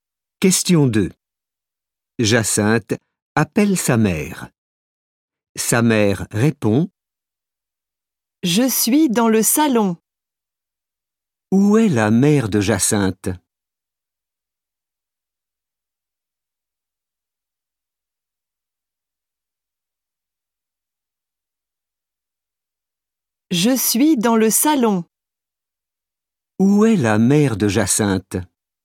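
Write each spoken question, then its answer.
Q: Où est la mère de Jacinthe ?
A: dans le salon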